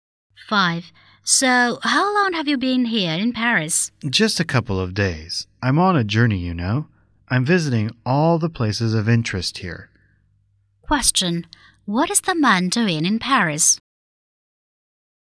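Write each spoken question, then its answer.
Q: What is the man doing in Paris?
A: Sightseeing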